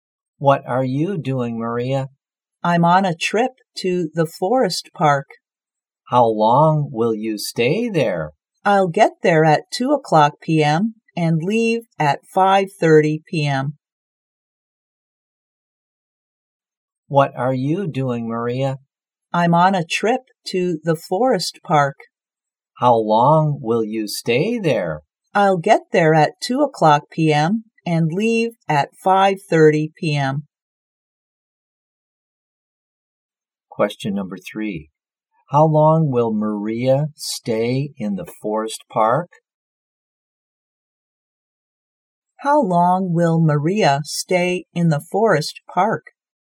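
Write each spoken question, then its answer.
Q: How long will Maria stay in the forest park?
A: Three and a half hours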